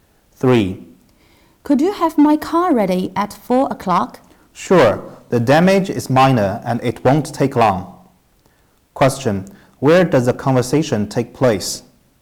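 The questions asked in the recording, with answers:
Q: Where does the conversation take place?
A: At a car repair shop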